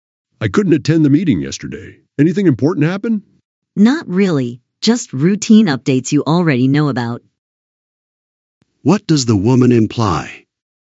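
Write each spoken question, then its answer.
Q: What does the woman imply?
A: He missed nothing important.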